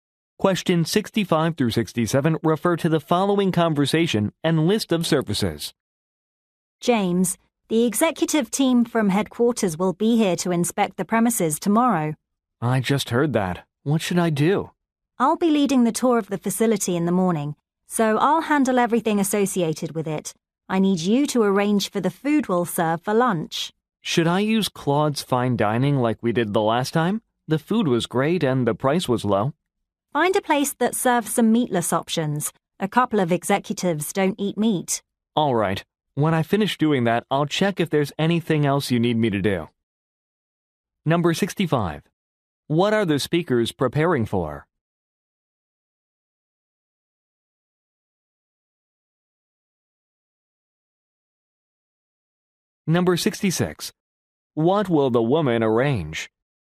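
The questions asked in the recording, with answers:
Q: What are the speakers preparing for?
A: A visit by executives from headquarters

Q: What will the woman arrange?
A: The facility tour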